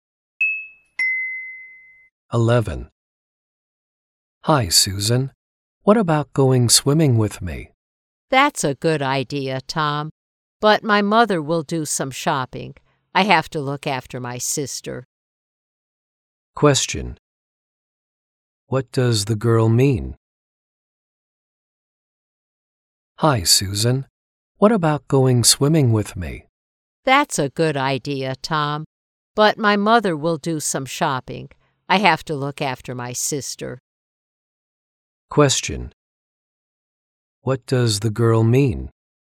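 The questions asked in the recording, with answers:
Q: What does the girl mean?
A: She can't go swimming because she has to look after her sister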